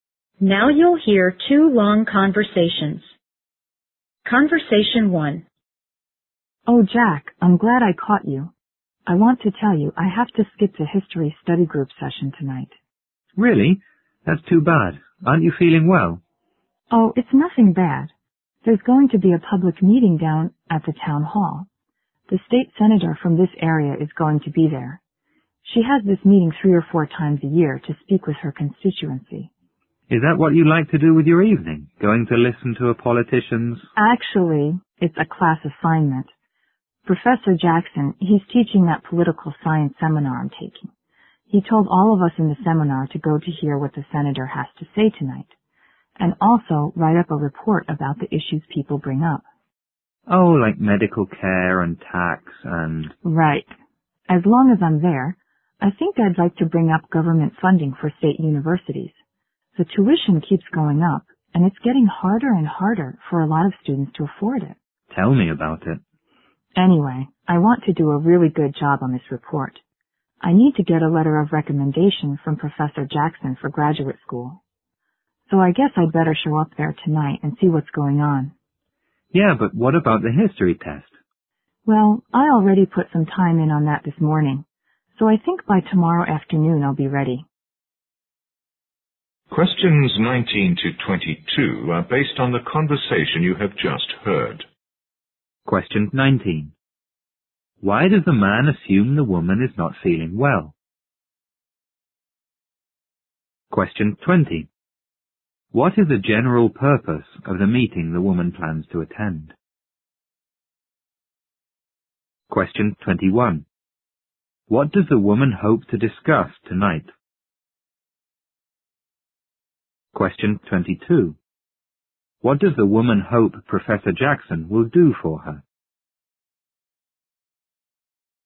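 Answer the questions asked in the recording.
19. Because she says she has to skip the history study group session tonight.
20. For the state senator to speak with her constituency.
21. Government funding for state universities.
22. Write her a letter of recommendation for graduate school.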